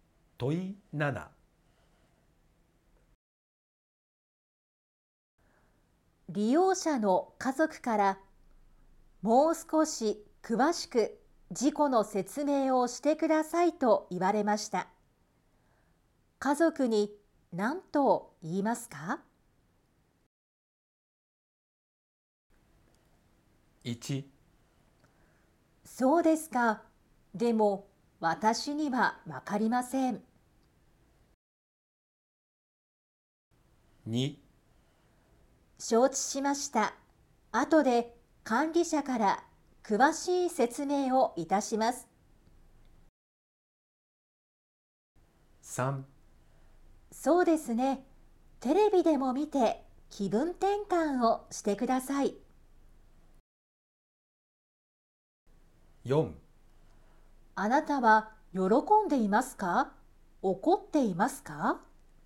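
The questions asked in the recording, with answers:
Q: 家族に何と言いますか?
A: 2: 承知しました。後で管理者から詳しい説明をいたします。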